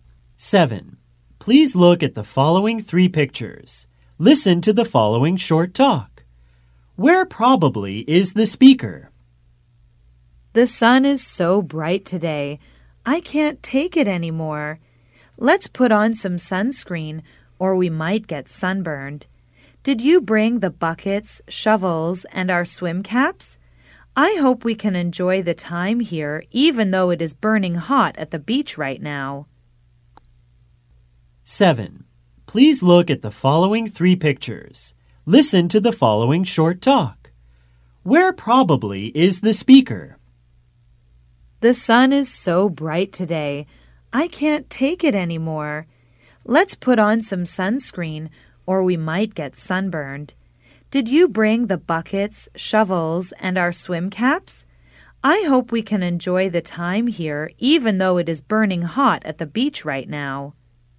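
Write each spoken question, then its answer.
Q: Where probably is the speaker?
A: At the beach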